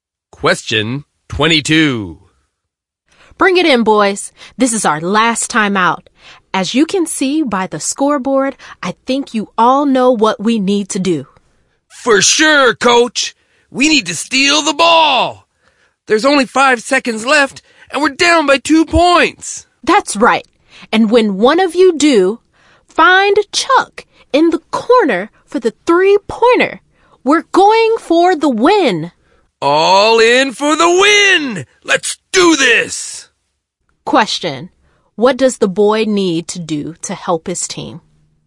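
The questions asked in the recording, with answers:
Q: What does the boy need to do to help his team?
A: Steal the ball and pass it to Chuck for a 3-pointer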